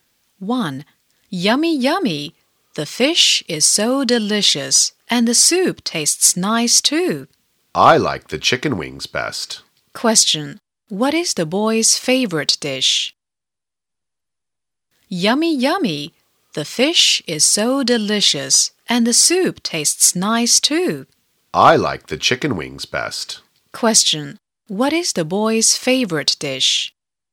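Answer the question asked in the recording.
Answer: Chicken wings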